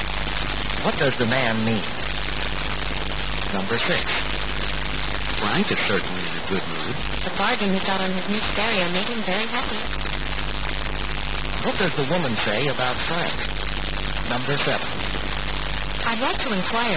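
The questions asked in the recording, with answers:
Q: What does the woman say about Frank?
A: He is happy about the bargain he got on his stereo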